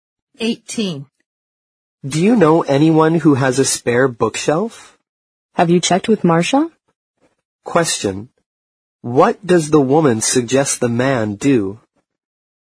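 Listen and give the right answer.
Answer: Ask Marcia if she has a spare bookshelf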